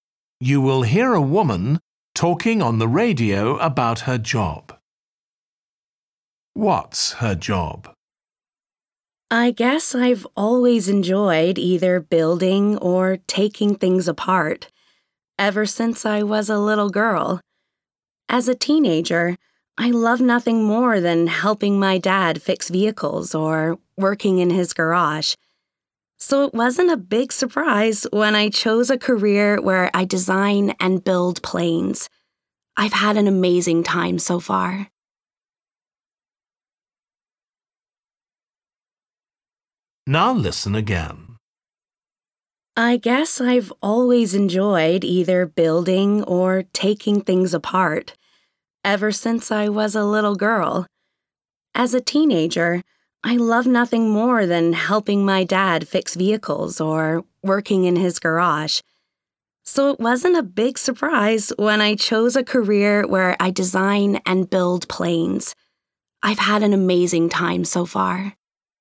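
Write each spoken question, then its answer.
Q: What's her job?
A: She designs and builds planes (engineer)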